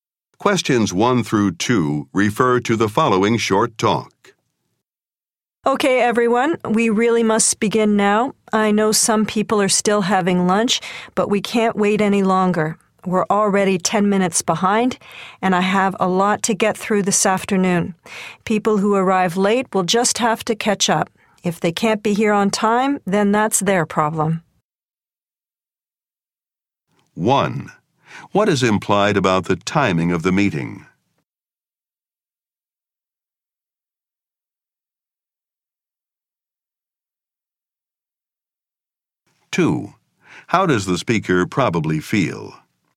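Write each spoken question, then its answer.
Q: What is implied about the timing of the meeting?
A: It is starting late, behind schedule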